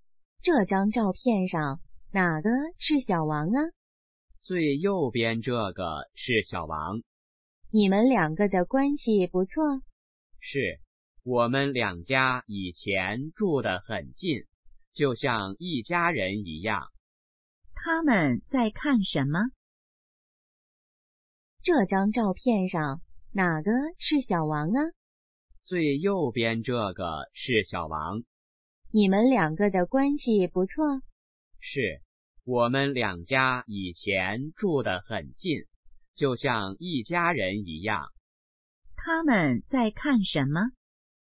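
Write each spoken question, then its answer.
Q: 他们在看什么?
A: 照片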